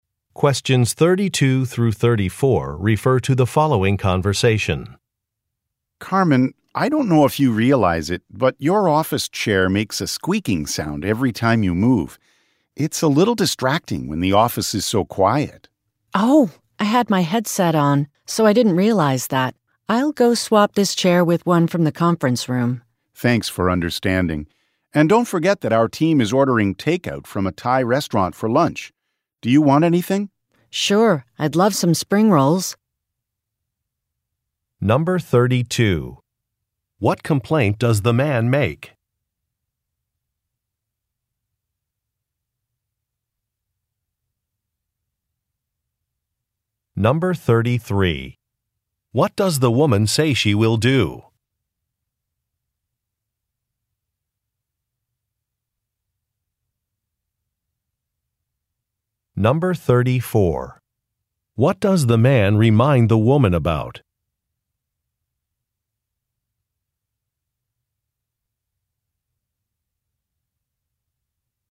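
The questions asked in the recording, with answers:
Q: What complaint does the man make?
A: The woman's chair squeaks (is noisy).

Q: What does the woman say she will do?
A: Swap her chair with one from the conference room.

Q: What does the man remind the woman about?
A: The team is ordering takeout from a Thai restaurant for lunch.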